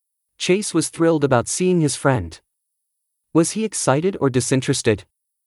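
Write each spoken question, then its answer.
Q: Was he excited or disinterested?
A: Excited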